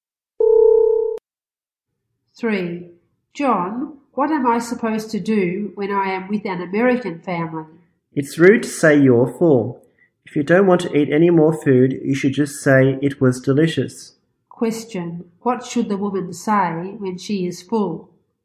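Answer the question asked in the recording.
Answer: It was delicious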